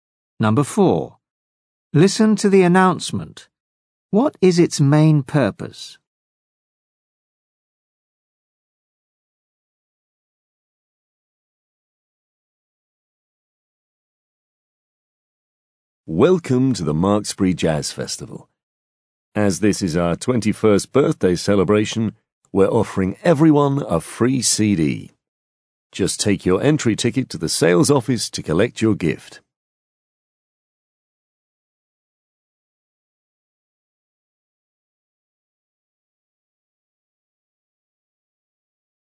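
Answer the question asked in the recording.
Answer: To tell people about a free CD gift.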